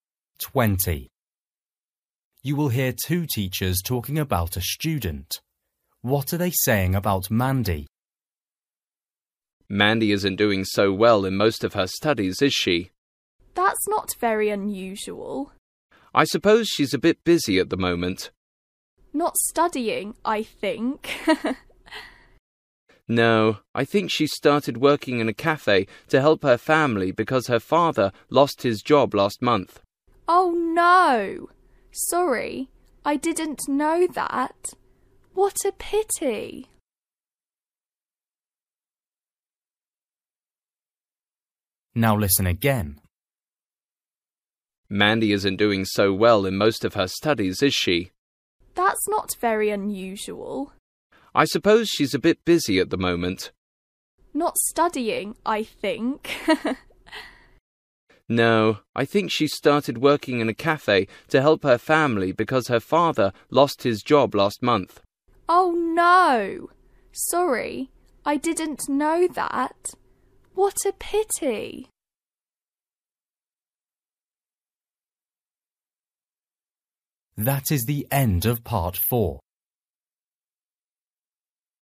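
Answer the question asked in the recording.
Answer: She is busy working in a cafe to help her family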